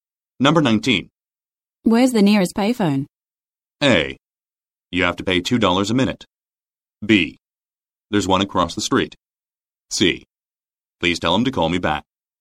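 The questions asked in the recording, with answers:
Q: Where's the nearest payphone?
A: B: There's one across the street.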